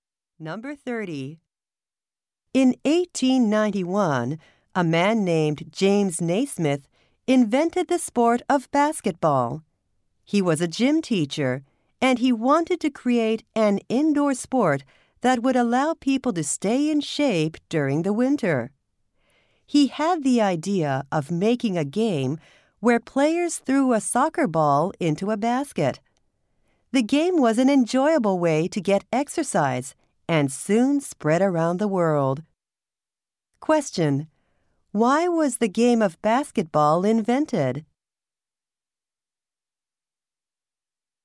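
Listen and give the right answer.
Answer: So people could stay in shape indoors during the winter.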